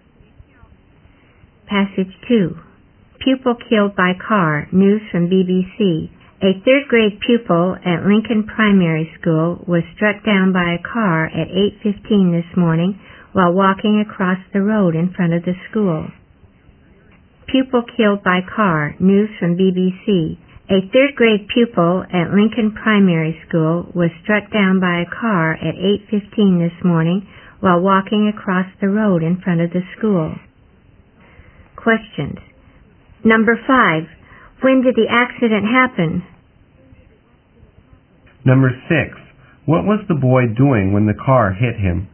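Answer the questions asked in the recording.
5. At 8:15 this morning.
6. Walking across the road in front of the school.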